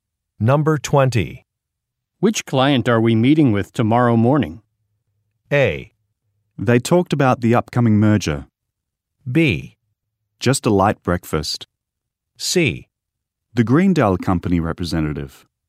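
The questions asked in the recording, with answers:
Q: Which client are we meeting with tomorrow morning?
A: C: The Greendale Company representative.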